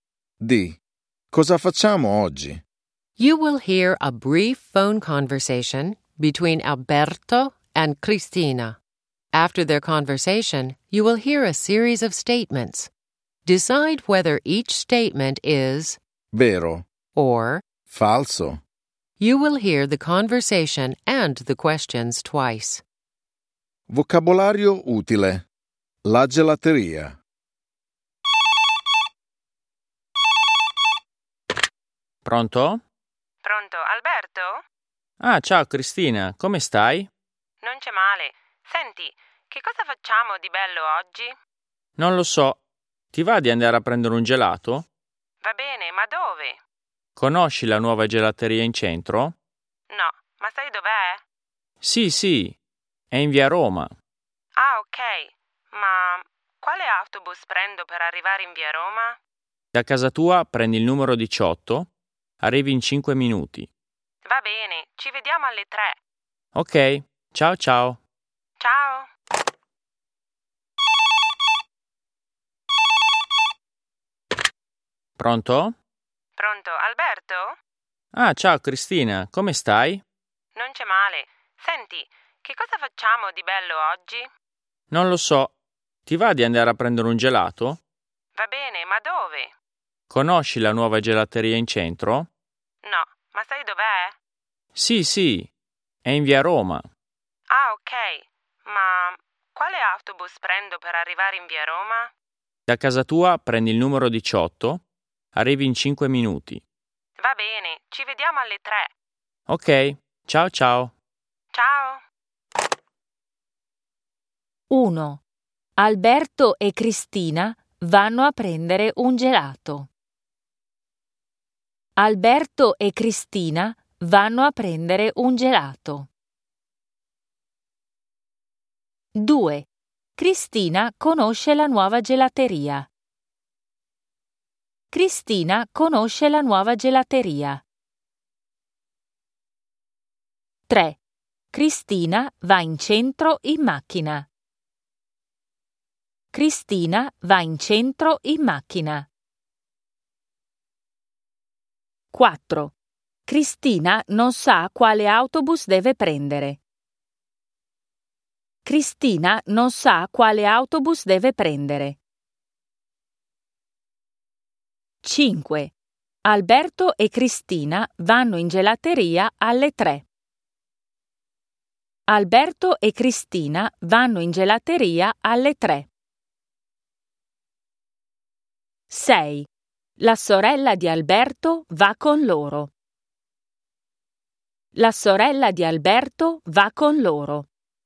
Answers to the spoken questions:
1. 1. Vero.
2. 2. Falso.
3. 3. Falso.
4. 4. Vero.
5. 5. Vero.
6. 6. Falso.